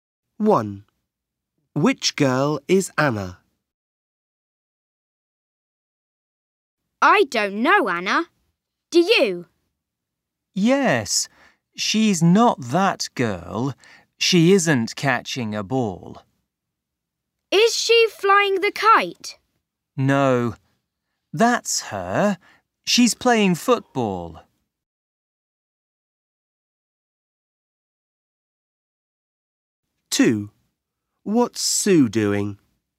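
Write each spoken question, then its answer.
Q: Which girl is Anna?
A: the girl playing football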